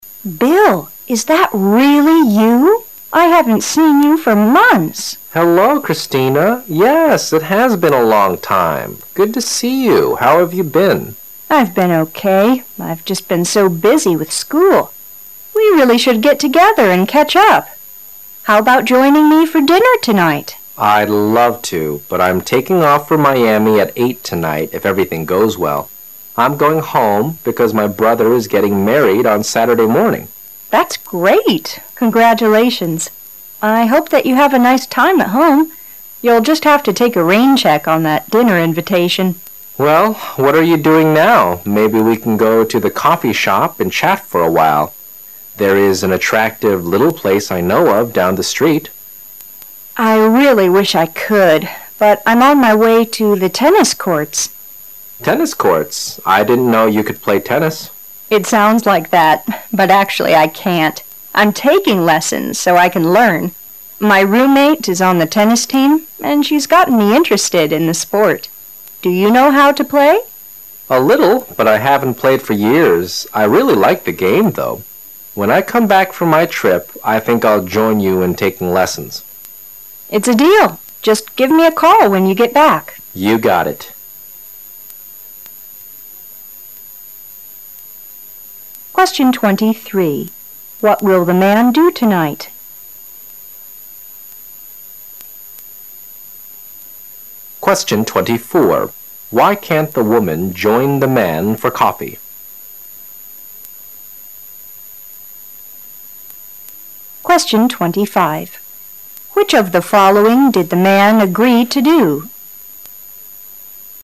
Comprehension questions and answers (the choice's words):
Questions 23 to 25 are based on the conversation you have just heard.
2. Why can't the woman join the man for coffee?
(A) Because she doesn't drink coffee.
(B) Because she has a plane to catch.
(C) Because she has to go to a lesson.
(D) Because she doesn't like the man.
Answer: Because she has to go to a lesson.

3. Which of the following did the man agree to do?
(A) He will postpone the trip.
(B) He will marry the woman.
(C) He will cook dinner for the woman.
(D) He will take tennis lessons.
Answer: He will take tennis lessons.

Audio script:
[解析] 23-25 W: Bill, is that really you? I haven't seen you for months. M: Hello, Christina. Yes, it has been a long time. Good to see you. How have you been? W: I've been okay. I've just been so busy with school. We really should get together and catch up. How about joining me for dinner tonight? M: I'd love to, but I'm taking off for Miami at 8:00 tonight if everything goes well. I'm going home because my brother is getting married on Saturday morning. W: That's great. Congratulations! I hope that you have a nice time at home. You'll just have to take a rain check on that dinner invitation. M: Well, what are you doing now? Maybe we can go to the coffee shop and chat for a while. It is attractive, little place I know of down the street. W: I really wish I could, but I'm on my way to the tennis courts. M: Tennis courts? I didn't know you could play tennis. W: It sounds like that, but actually I can't. I'm taking lessons so I can learn. My roommate is on the tennis team and she's gotten me interested in the sport. Do you know how to play? M: A little, but I haven't played for years. I really like the game, though. When I come back from my trip, I think I'll join you in taking lessons. W: It's a deal. Just give me a call when you get back. M: You got it. 23. What will the man do tonight?